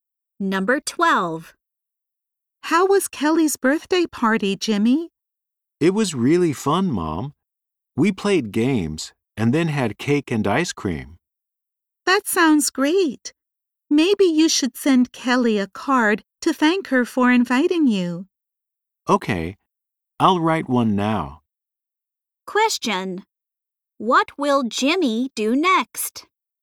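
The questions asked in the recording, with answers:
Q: What will Jimmy do next?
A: Write a thank-you card to Kelly.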